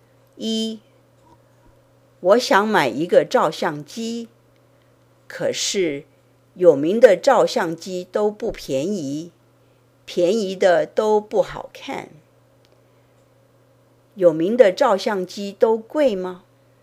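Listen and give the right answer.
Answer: 贵,有名的照相机都不便宜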